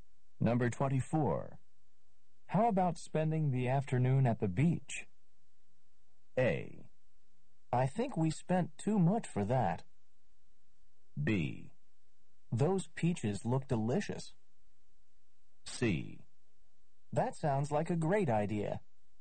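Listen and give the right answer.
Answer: C: That sounds like a great idea.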